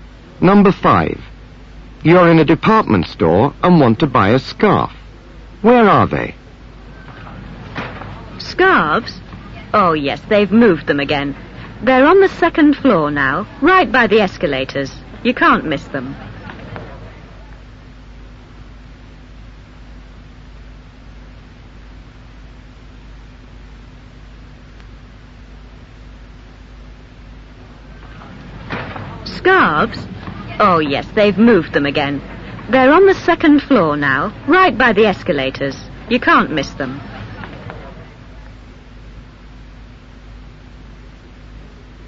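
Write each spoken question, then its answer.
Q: Where are they?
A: On the second floor, by the escalators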